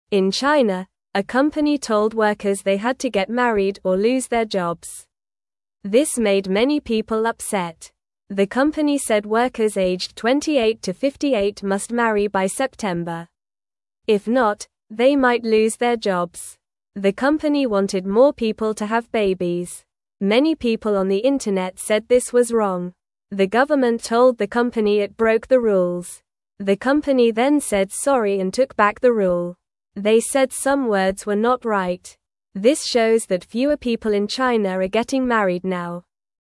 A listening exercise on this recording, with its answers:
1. In China, a (1)______ told workers they had to get (2)______ or lose their jobs.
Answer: company

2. In China, a (1)______ told workers they had to get (2)______ or lose their jobs.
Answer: married

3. If not, they might lose their (3)______.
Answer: jobs

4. The company (4)______ more people to have babies.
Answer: wanted

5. (5)______ people on the internet said this was (6)______.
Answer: Many

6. (5)______ people on the internet said this was (6)______.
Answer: wrong

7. They (7)______ some words were not right.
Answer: said

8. This shows that fewer people in (8)______ are getting married now.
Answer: China

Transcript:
In China, a company told workers they had to get married or lose their jobs. This made many people upset. The company said workers aged 28 to 58 must marry by September. If not, they might lose their jobs. The company wanted more people to have babies.
Many people on the internet said this was wrong. The government told the company it broke the rules. The company then said sorry and took back the rule. They said some words were not right. This shows that fewer people in China are getting married now.

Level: Level 1